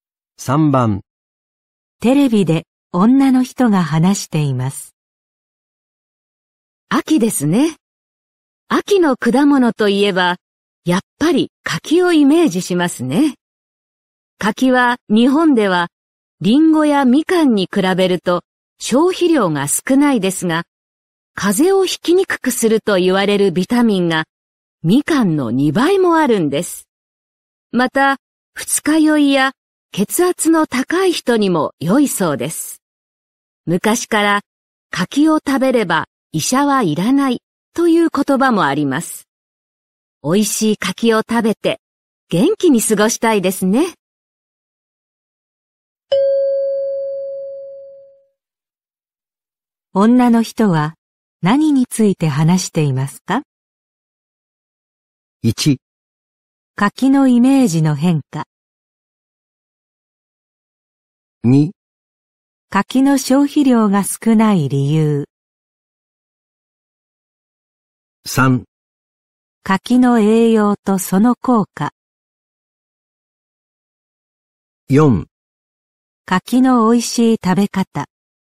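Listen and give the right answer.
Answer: 3: 柿の栄養とその効果。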